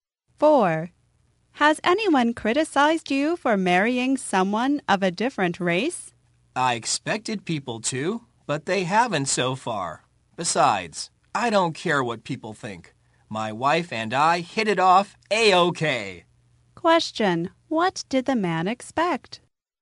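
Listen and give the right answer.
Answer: That people would criticize him for marrying someone of a different race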